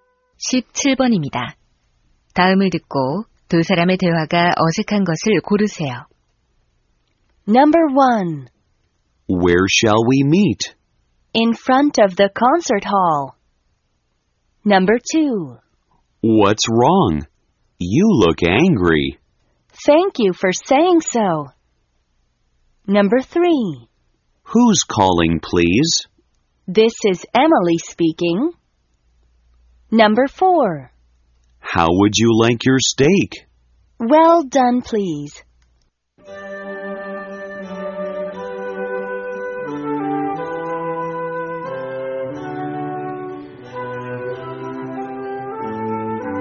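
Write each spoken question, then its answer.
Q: 다음을 듣고 두 사람의 대화가 어색한 것을 고르세요.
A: 2번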